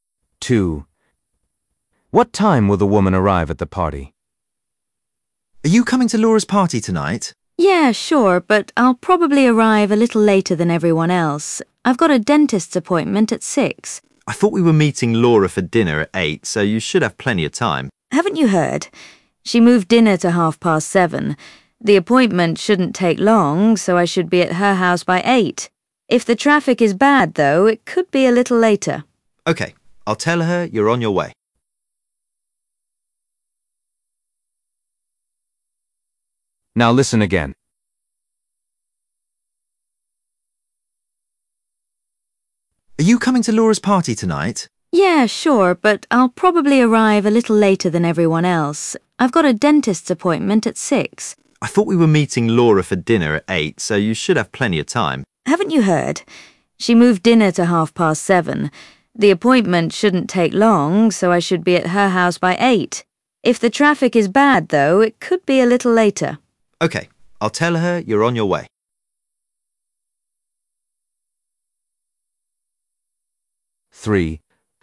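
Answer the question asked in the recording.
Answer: at 8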